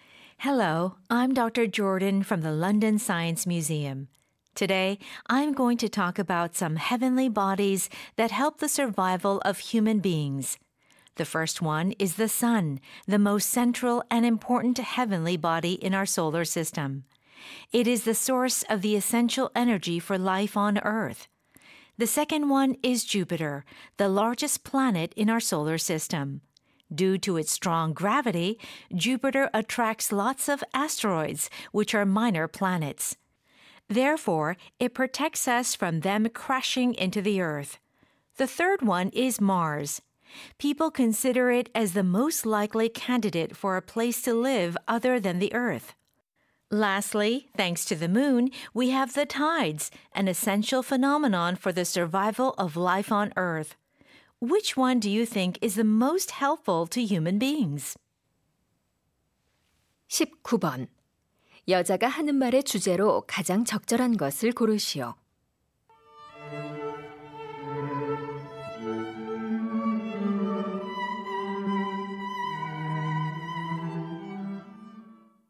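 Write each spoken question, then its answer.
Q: 여자가 하는 말의 주제로 가장 적절한 것을 고르시오.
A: 인류의 생존에 도움을 주는 천체들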